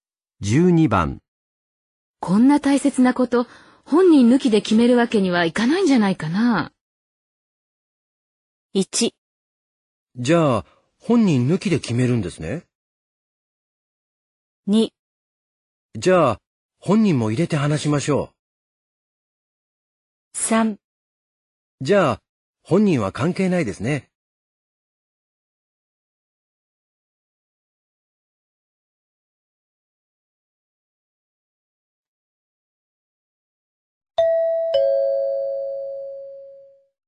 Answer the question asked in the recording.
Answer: 2

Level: N2 Listening · Test 12